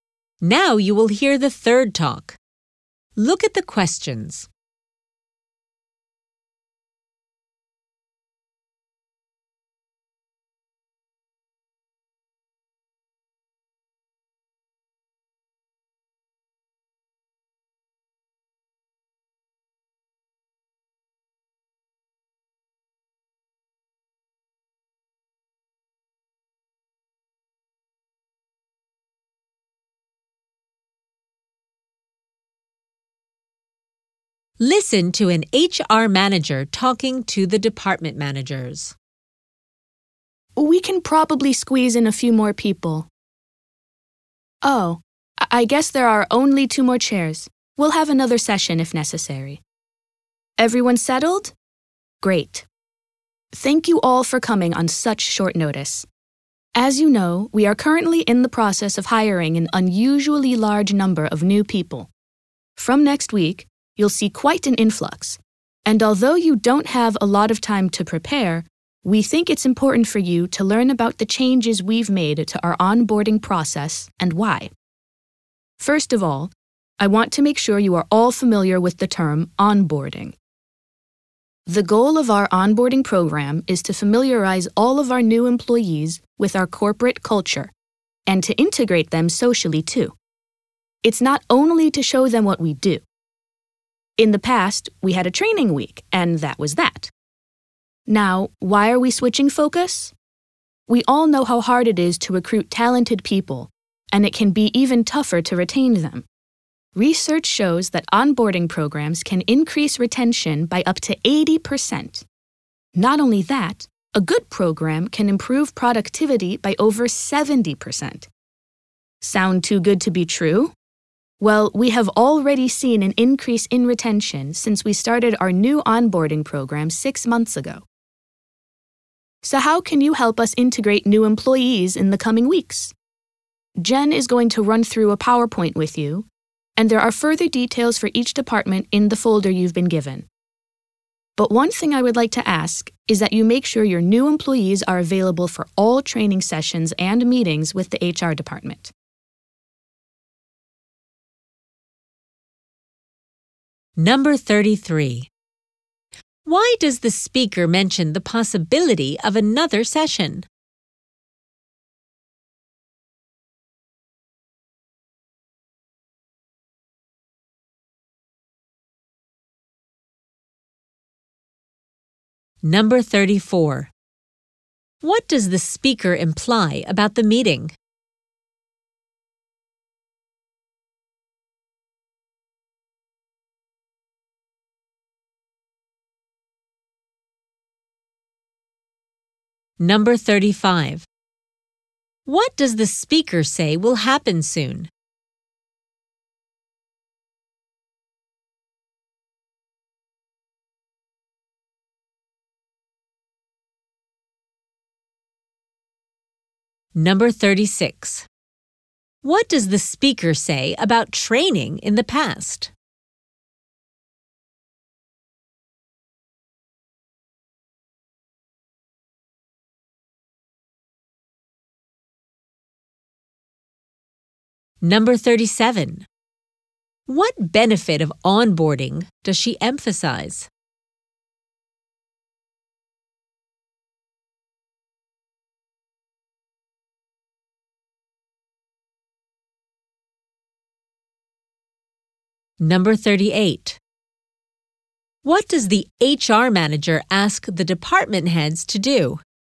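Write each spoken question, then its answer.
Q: Why does the speaker mention the possibility of another session?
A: There aren't enough chairs for everyone

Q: What does the speaker imply about the meeting?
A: It was arranged at short notice

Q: What does the speaker say will happen soon?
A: Many new employees will start next week

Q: What does the speaker say about training in the past?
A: It was only a one-week training

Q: What does the HR manager ask the department heads to do?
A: Make sure new employees are available for all training sessions and HR meetings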